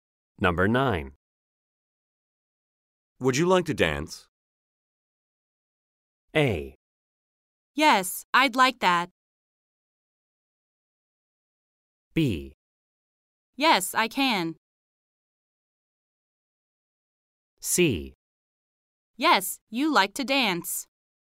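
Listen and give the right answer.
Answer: A: Yes, I'd like that.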